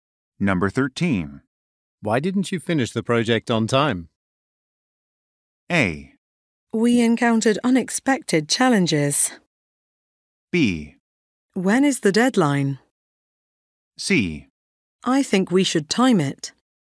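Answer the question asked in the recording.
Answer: A: We encountered unexpected challenges.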